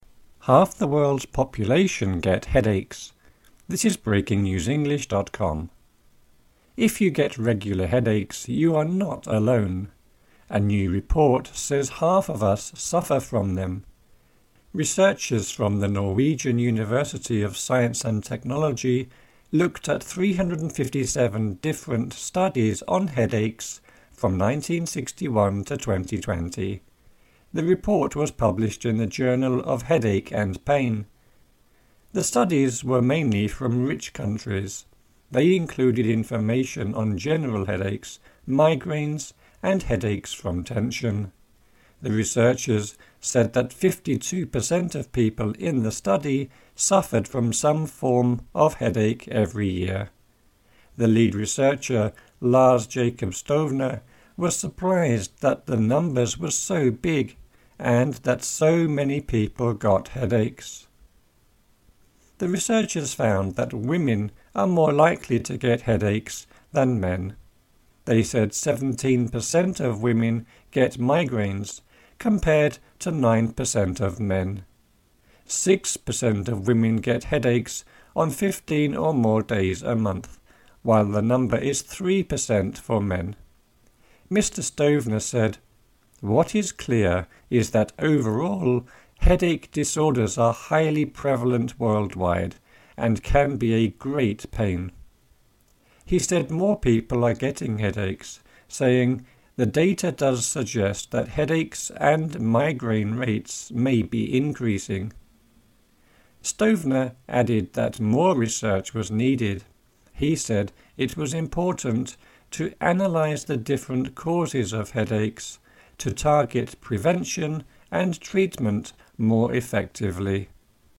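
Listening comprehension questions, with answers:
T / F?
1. The article says people who are alone get headaches.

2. Researchers looked at 357 studies that gave them headaches.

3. Researchers found that 52% of the study participants got headaches every year.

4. A researcher was surprised that so many people got headaches.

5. Women get more headaches than men.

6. Men get more migraines than women.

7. The number of people who get headaches is going down.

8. A researcher wants to find ways to stop people from getting headaches.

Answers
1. F
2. F
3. T
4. T
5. T
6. F
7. F
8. T

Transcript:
Half the world's population get headaches
Headache
If you get regular headaches, you are not alone. A new report says half of us suffer from them. Researchers from the Norwegian University of Science and Technology looked at 357 different studies on headaches from 1961 to 2020. The report was published in "The Journal of Headache and Pain". 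The studies were mainly from rich countries. They included information on general headaches, migraines, and headaches from tension. The researchers said that 52 per cent of people in the study suffered from some form of headache every year. The lead researcher, Lars Jacob Stovner, was surprised that the numbers were so big and that so many people got headaches.
The researchers found that women are more likely to get headaches than men. They said 17 per cent of women get migraines, compared to 9 per cent of men. Six per cent of women get headaches on 15 or more days a month, while the number is three per cent for men. Mr Stovner said: "What is clear is that overall, headache disorders are highly prevalent worldwide and can be a [great pain]." He said more people are getting headaches, saying: "The data does suggest that headaches and migraine rates may be increasing." Stovner added that more research was needed. 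He said it was important, "to analyze the different causes of headaches...to target prevention and treatment more effectively".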